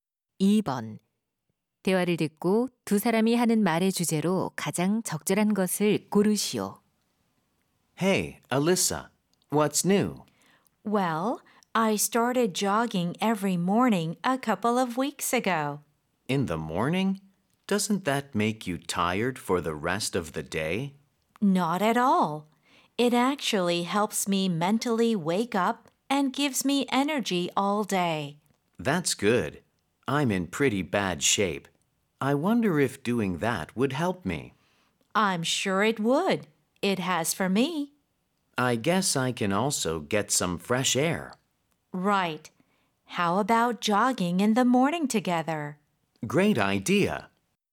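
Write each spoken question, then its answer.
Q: 대화를 듣고 두 사람이 하는 말의 주제로 가장 적절한 것을 고르시오.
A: 아침 조깅의 장점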